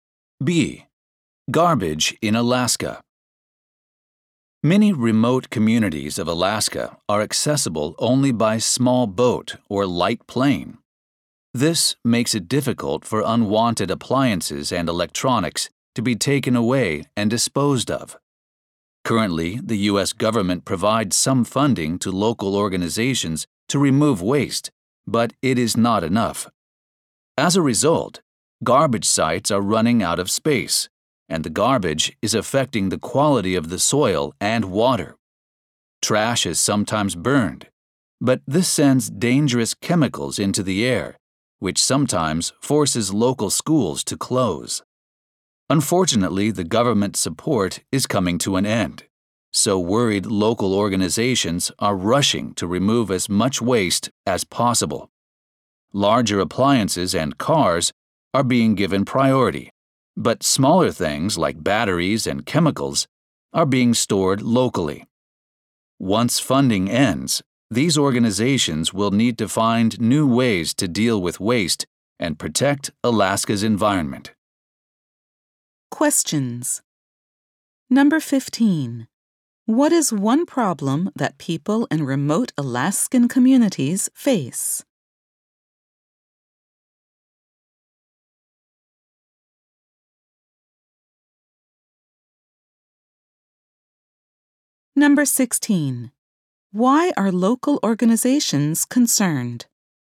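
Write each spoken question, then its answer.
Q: What is one problem that people in remote Alaskan communities face?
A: It is hard to get rid of unwanted appliances and electronics.

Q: Why are local organizations concerned?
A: Government funding for waste removal is coming to an end.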